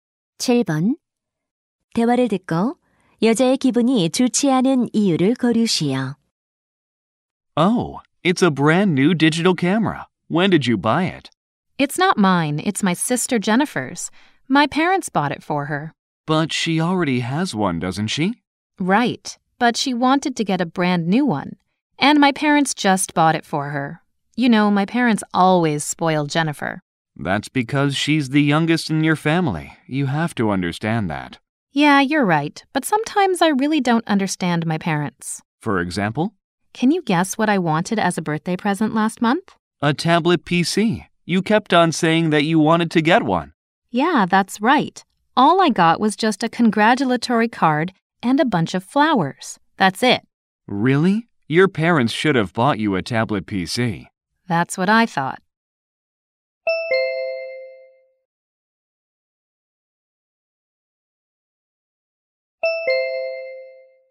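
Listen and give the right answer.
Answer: 부모님이 동생만 새 카메라를 사 주고 자기 생일에는 원하던 태블릿 PC를 사 주지 않아서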